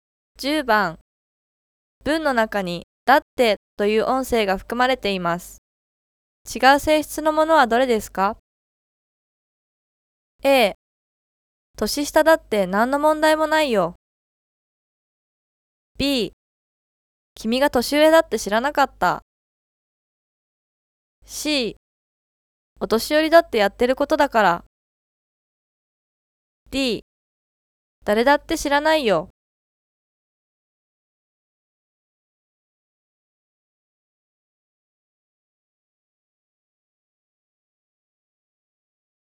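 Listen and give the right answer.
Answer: B: 君が年上だって知らなかった。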